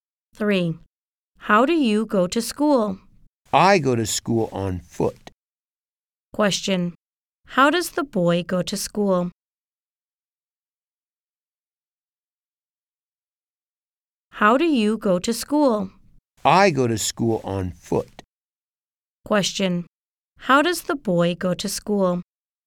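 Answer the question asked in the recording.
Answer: On foot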